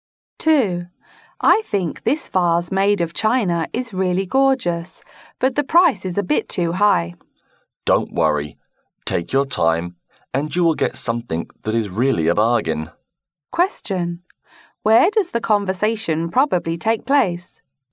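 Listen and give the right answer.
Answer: In a shop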